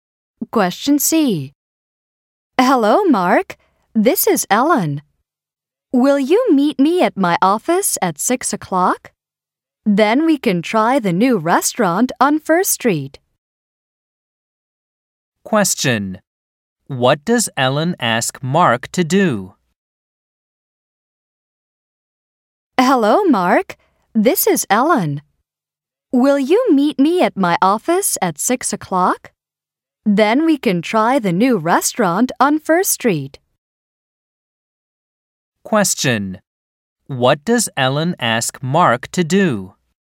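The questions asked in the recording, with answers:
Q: What does Ellen ask Mark to do?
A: Meet her at her office at 6 o'clock.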